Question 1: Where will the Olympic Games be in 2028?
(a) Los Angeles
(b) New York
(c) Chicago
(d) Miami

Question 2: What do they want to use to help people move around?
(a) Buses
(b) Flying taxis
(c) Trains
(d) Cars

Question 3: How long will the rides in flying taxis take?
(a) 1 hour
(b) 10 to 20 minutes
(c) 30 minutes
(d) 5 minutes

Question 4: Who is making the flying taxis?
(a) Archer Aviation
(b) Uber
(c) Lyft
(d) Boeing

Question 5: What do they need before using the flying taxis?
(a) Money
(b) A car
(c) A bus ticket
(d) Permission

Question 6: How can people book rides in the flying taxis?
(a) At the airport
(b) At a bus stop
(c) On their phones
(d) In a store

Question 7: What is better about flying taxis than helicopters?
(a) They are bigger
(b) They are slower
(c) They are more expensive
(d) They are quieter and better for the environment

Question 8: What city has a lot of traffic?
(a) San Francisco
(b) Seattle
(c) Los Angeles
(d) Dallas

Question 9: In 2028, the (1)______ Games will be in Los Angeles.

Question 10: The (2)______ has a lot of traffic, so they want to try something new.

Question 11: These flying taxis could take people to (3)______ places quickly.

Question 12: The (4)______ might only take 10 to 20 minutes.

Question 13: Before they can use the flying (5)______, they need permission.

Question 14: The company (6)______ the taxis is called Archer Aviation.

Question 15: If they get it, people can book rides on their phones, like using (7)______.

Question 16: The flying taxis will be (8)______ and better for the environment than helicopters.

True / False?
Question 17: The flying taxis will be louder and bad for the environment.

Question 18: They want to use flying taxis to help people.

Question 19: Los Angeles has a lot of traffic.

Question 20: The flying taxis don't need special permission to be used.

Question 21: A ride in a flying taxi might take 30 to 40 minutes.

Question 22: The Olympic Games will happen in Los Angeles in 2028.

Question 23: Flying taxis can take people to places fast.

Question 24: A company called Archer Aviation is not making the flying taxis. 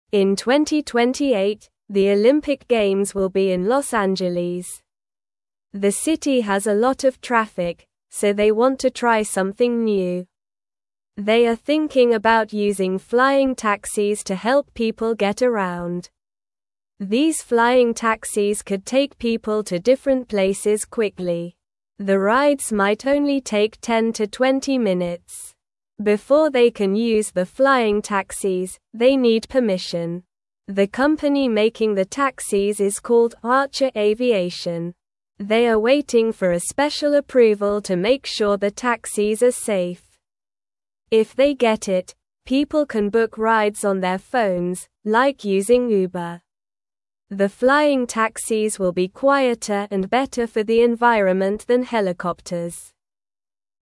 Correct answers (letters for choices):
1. a
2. b
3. b
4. a
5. d
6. c
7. d
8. c
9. Olympic
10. city
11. different
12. rides
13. taxis
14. making
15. Uber
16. quieter
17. False
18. True
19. True
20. False
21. False
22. True
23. True
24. False

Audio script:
In 2028, the Olympic Games will be in Los Angeles. The city has a lot of traffic, so they want to try something new. They are thinking about using flying taxis to help people get around. These flying taxis could take people to different places quickly. The rides might only take 10 to 20 minutes.
Before they can use the flying taxis, they need permission. The company making the taxis is called Archer Aviation. They are waiting for a special approval to make sure the taxis are safe. If they get it, people can book rides on their phones, like using Uber. The flying taxis will be quieter and better for the environment than helicopters.

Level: Level 1